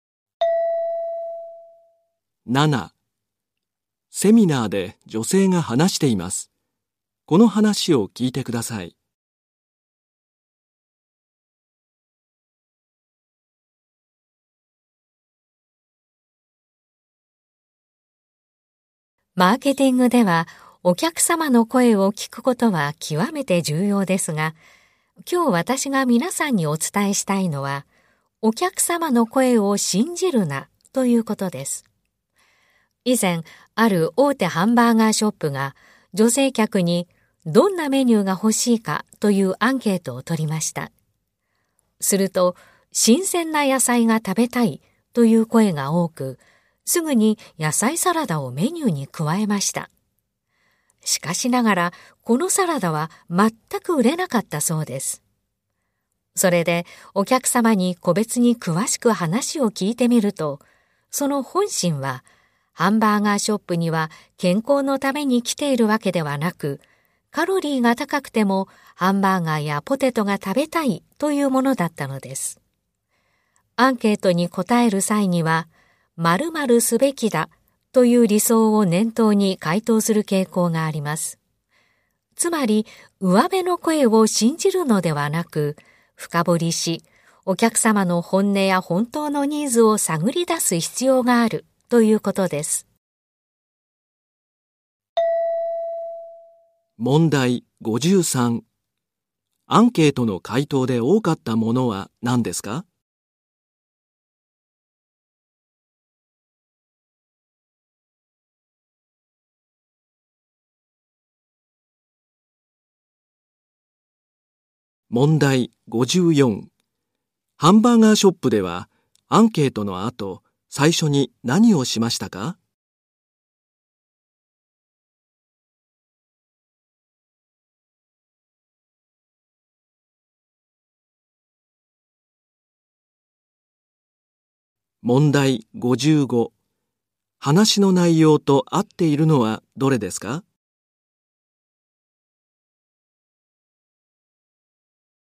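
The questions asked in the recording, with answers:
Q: アンケートの回答で多かったものは何ですか?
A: 新鮮な野菜が食べたい

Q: ハンバーガーショップでは、アンケートの後、最初に何をしましたか?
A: 野菜サラダをメニューに加えた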